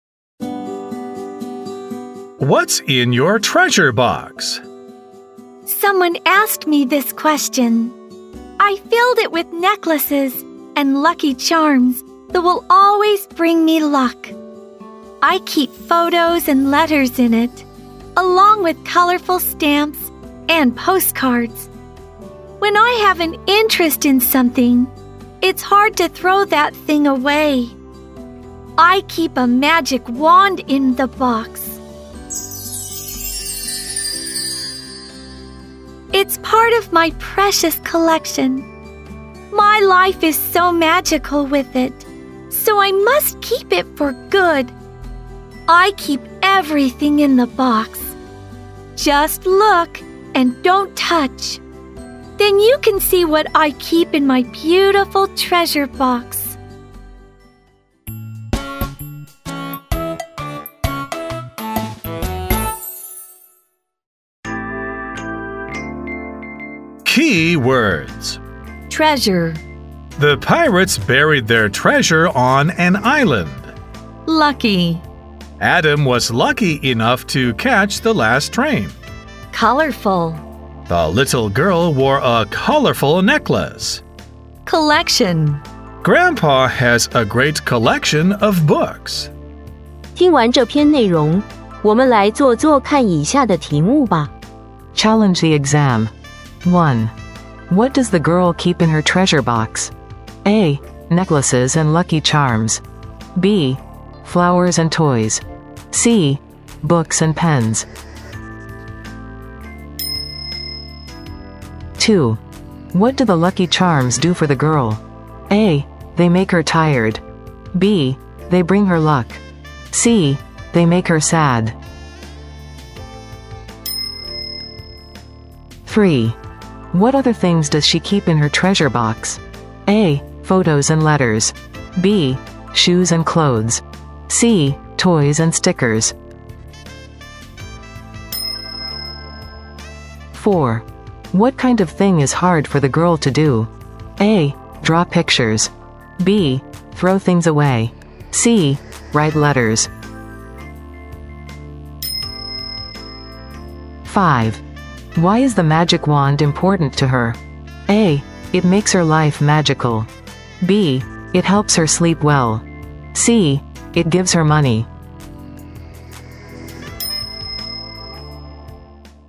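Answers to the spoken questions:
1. A: Necklaces and lucky charms.
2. B: They bring her luck.
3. A: Photos and letters.
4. B: Throw things away.
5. A: It makes her life magical.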